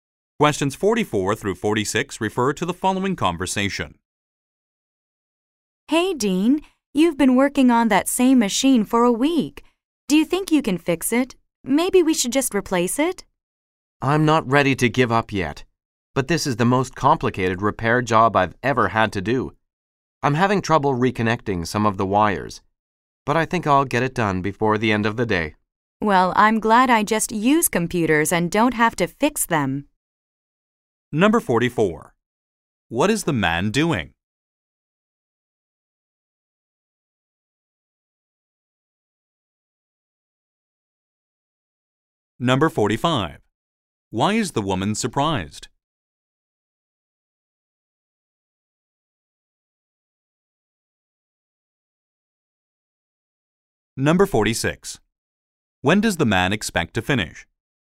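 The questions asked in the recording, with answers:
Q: What is the man doing?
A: Repairing a machine (computer)

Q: When does the man expect to finish?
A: Before the end of the day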